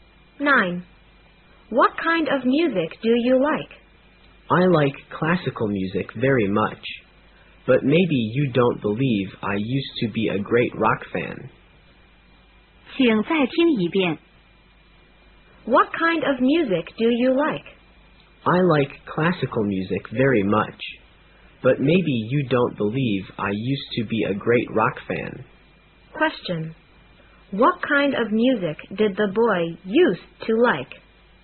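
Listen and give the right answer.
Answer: Rock music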